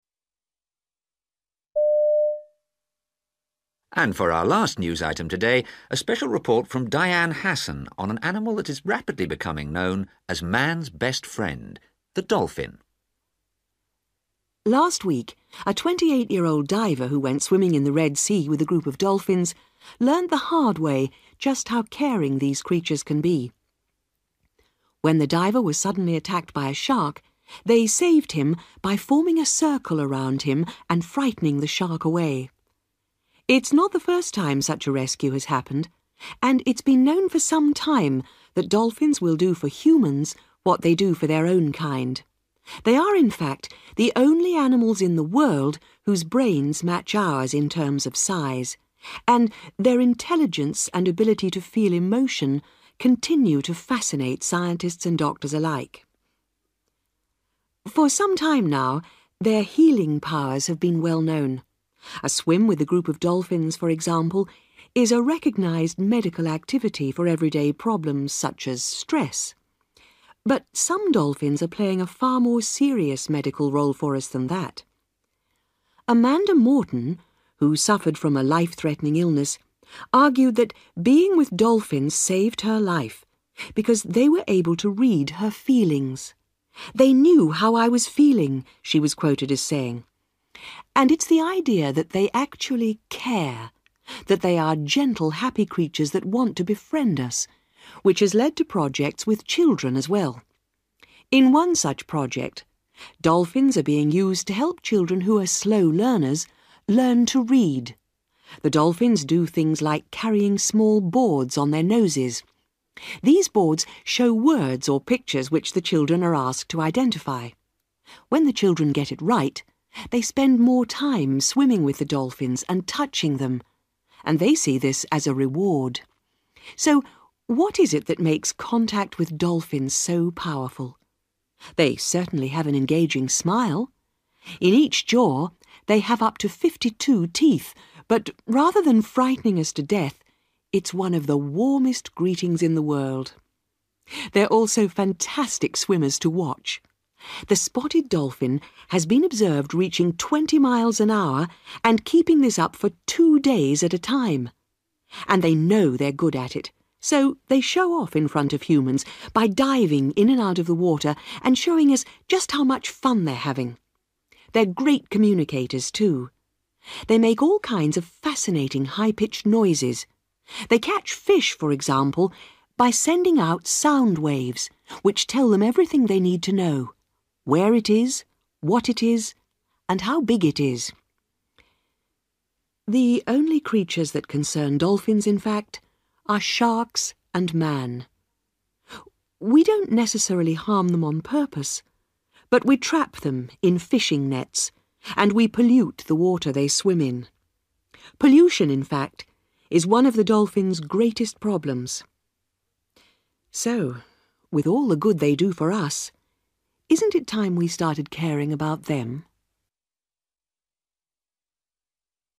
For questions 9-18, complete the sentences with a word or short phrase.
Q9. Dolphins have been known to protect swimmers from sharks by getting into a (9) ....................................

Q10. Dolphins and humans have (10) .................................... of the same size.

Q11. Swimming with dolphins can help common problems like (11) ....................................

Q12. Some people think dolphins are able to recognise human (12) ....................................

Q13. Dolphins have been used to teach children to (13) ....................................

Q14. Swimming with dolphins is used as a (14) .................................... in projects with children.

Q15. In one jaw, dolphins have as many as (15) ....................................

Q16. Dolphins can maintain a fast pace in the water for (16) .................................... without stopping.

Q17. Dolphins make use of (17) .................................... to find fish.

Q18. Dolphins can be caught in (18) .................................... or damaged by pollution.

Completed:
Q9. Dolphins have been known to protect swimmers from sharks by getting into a circle (around them)
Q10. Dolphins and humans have (a) brain(s) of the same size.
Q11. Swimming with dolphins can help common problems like stress
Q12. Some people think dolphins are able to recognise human feelings
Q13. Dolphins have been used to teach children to read
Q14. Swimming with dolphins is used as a reward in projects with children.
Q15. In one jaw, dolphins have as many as 52 teeth
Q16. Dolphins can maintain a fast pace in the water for two days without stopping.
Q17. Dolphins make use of sound wave(s)/sound(s) / high-pitched noises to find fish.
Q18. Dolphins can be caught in (fishing) nets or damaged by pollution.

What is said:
Newsreader: And for our last news item today, a special report from Diane Hassan on an animal that is rapidly becoming known as 'man's best friend', the dolphin.
Diane: Last week, a twenty-eight-year-old diver who went swimming in the Red Sea with a group of dolphins learnt the hard way just how caring these creatures can be. When the diver was suddenly attacked by a shark, they saved him by forming a circle around him and frightening the shark away.
It's not the first time such a rescue has happened and it's been known for some time that dolphins will do for humans what they do for their own kind. They are, in fact, the only animals in the world whose brains match ours in term of size, and their intelligence and ability to feel emotion continue to fascinate scientists and doctors alike. For some time now, their healing powers have been well known. A swim with a group of dolphins, for example, is a recognised 'medical' activity for everyday problems such as stress. But some dolphins are playing a far more serious medical role for us than that.
Amanda Morton, who suffered from a life-threatening illness, argued that being with dolphins saved her life because they were able to read her feelings. 'They knew how I was feeling,' she was quoted as saying. And it's the idea that they actually 'care', that they are gently, happy creatures that want to befriend us, which has led to projects with children as well. In one such project, dolphins are being used to help children who are slow learners learn to read. The dolphins do things like carrying small boards on their noses. These boards show words or pictures which the children are asked to identify. When the children get it right, they spend more time swimming with the dolphins and touching them and they see this as a reward. So what is it that makes contact with dolphins so powerful? They certainly have an engaging smile ... in each jaw they have up to fifty-two teeth, but rather than frightening us to death, it's one of the warmest greetings in the world! They're also fantastic swimmers to watch ... the spotted dolphin has been observed reaching twenty miles an hour and keeping this up for two days at a time. And they know they're good as it so they show off in front of humans by diving in and out of the water and showing us just how much fun they're having. They're great communicators too. They make all kinds of fascinating high-pitched noises. They catch fish, for example, by sending out sound waves which tell them everything they need to know – where it is, what it is and how big it is.
The only creatures that concern dolphins, in fact, are sharks and man. We don't necessarily harm them on purpose, but we trap them in fishing nets and we pollute the water they swim in. Pollution, in fact, is one of the dolphin's greatest problems. So with all the good they do for us, isn't it time we started caring about them?